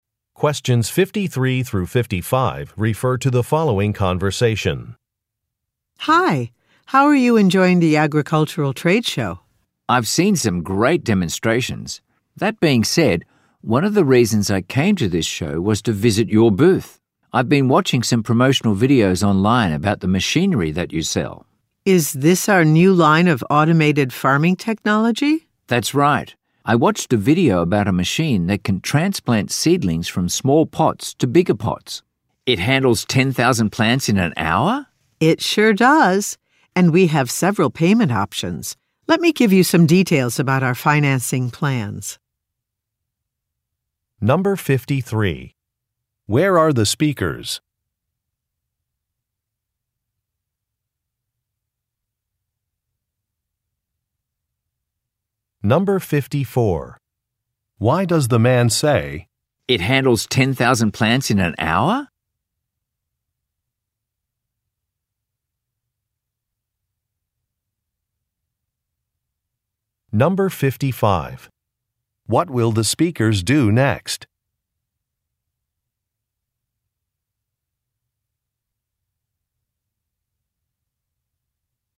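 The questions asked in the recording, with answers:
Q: Where are the speakers?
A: At an agricultural trade show

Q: What will the speakers do next?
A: Discuss financing plans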